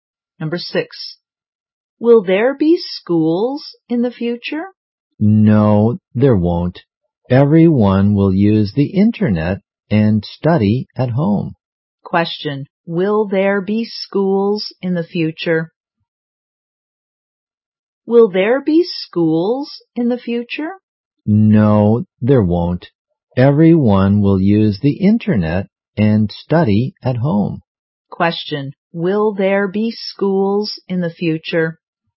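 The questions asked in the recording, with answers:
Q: Will there be schools in the future?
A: No, there won't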